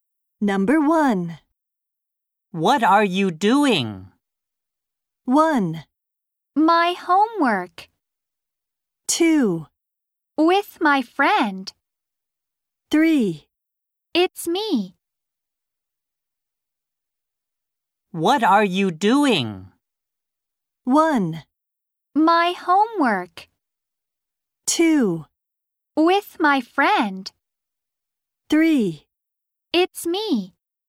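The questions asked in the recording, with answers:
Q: What are you doing?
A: 1: My homework.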